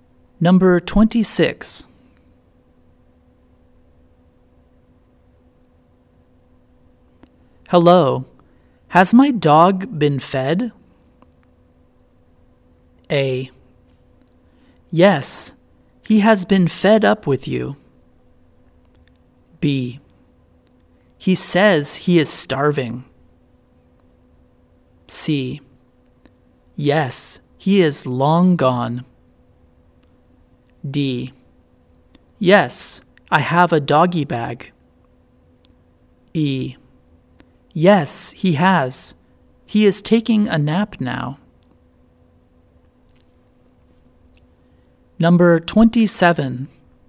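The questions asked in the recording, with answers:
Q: Hello, has my dog been fed?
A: E: Yes, he has. He is taking a nap now.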